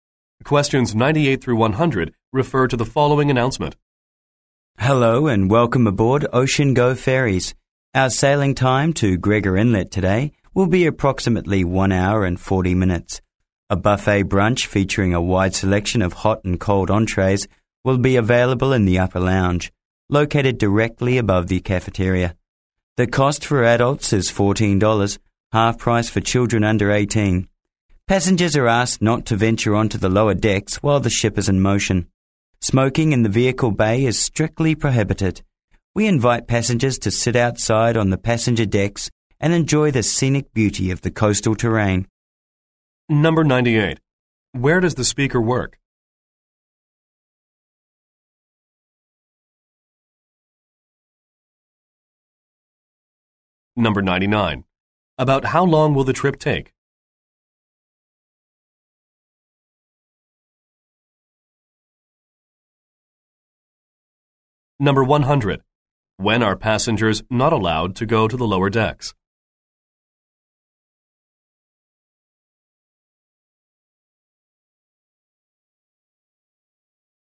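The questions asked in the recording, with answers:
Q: Where does the speaker work?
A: On a ferry (Ocean Go Ferries)

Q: About how long will the trip take?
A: About 1 hour and 40 minutes

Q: When are passengers not allowed to go to the lower decks?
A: While the ship is in motion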